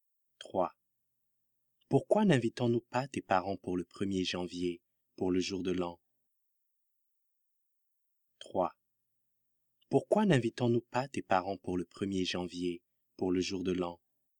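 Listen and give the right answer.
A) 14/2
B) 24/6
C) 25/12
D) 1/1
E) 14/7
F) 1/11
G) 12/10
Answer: D) 1/1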